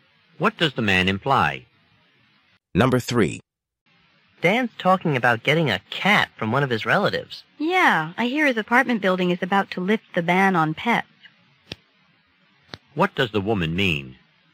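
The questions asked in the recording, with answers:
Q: What does the woman mean?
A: Dan may soon be allowed to keep a cat in his apartment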